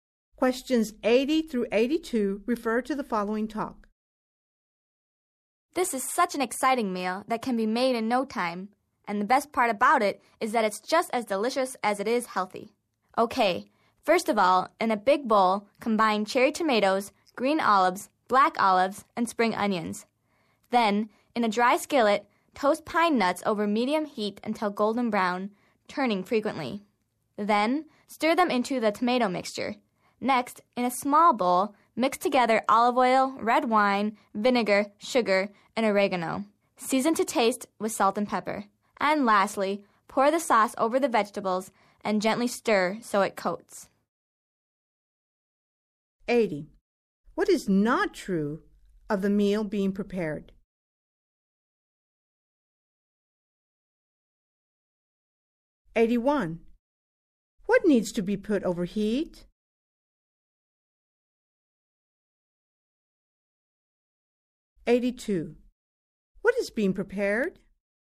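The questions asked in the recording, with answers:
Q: What needs to be put over heat?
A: Pine nuts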